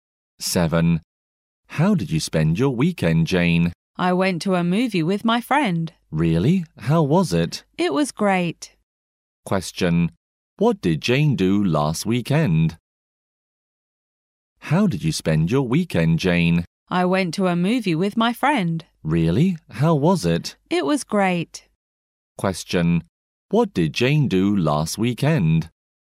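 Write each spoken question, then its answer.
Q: Question. What did Jane do last weekend?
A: She went to a movie with her friend.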